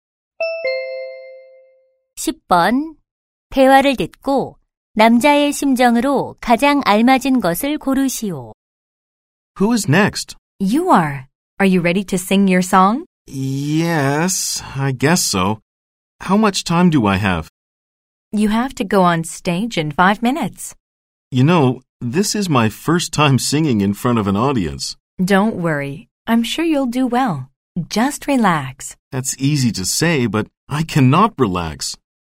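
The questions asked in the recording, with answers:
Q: 대화를 듣고 남자의 심정으로 가장 알맞은 것을 고르시오.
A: 긴장됨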